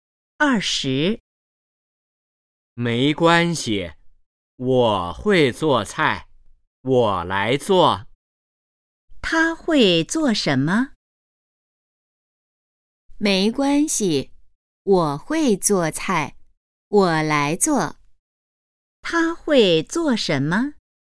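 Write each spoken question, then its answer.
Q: 他会做什么?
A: 做菜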